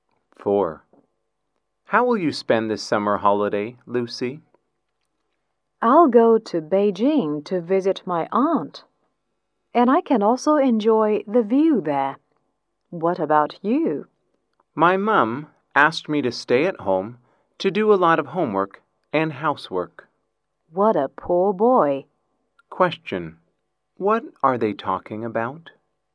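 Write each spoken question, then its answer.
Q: Question, what are they talking about?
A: Their summer holiday plans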